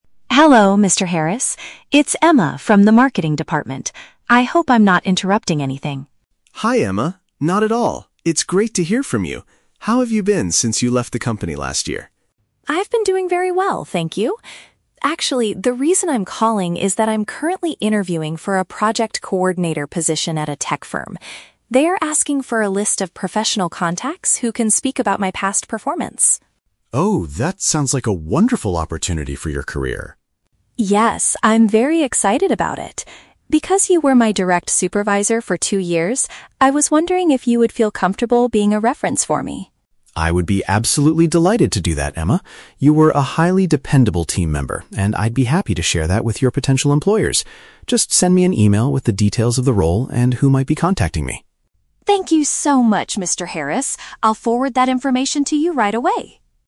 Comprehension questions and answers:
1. Why is Emma contacting Mr. Harris?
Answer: To request his permission to use him as a professional contact.

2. How does Mr. Harris feel about Emma's request?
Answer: He is extremely willing to provide a positive evaluation of her work.

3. What does Mr. Harris want Emma to do next?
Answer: Provide him with written information about the new position.

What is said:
Emma: Hello, Mr. Harris. It's Emma from the marketing department. I hope I'm not interrupting anything.
Mr. Harris: Hi, Emma! Not at all. It's great to hear from you. How have you been since you left the company last year?
Emma: I've been doing very well, thank you. Actually, the reason I'm calling is that I'm currently interviewing for a Project Coordinator position at a tech firm. They are asking for a list of professional contacts who can speak about my past performance.
Mr. Harris: Oh, that sounds like a wonderful opportunity for your career.
Emma: Yes, I'm very excited about it. Because you were my direct supervisor for two years, I was wondering if you would feel comfortable being a reference for me?
Mr. Harris: I would be absolutely delighted to do that, Emma. You were a highly dependable team member, and I'd be happy to share that with your potential employers. Just send me an email with the details of the role and who might be contacting me.